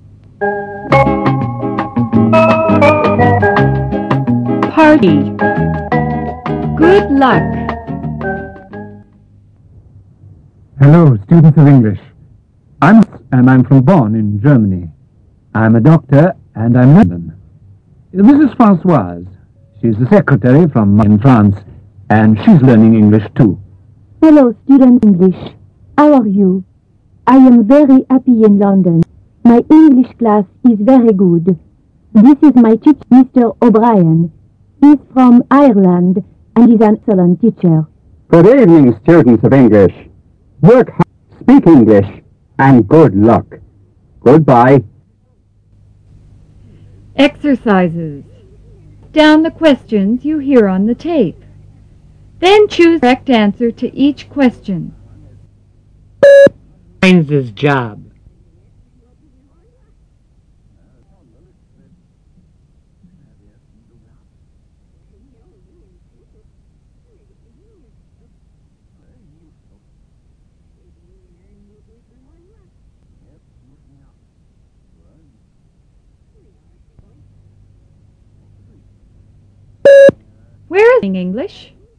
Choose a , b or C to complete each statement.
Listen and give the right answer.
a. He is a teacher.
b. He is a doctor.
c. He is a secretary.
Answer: b. He is a doctor.